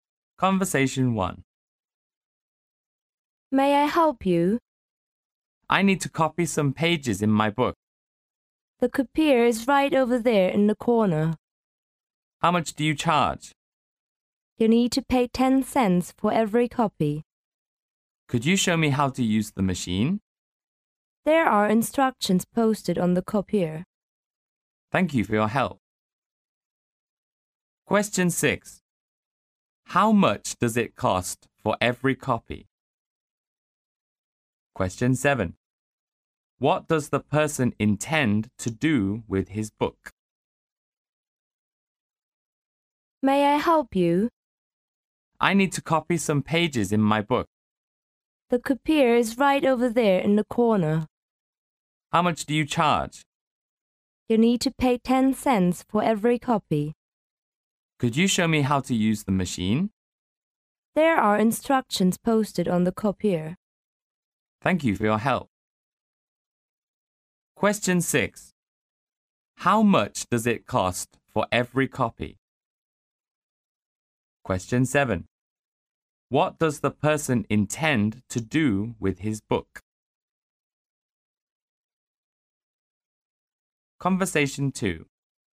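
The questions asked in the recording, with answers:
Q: How much does it cost for every copy?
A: 10 cents

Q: What does the person intend to do with his book?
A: Copy some pages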